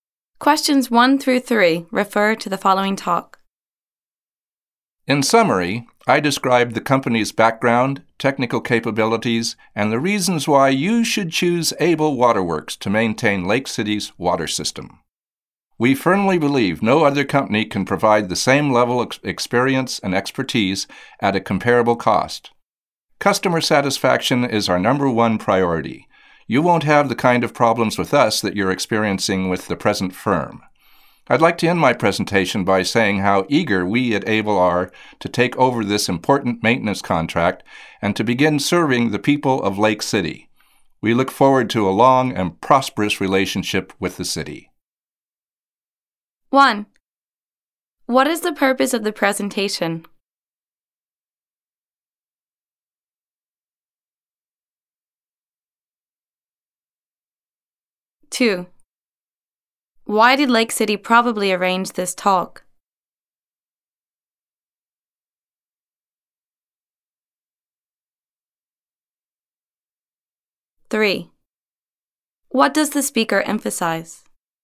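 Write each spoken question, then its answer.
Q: What is the purpose of the presentation?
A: To win the contract to maintain Lake City's water system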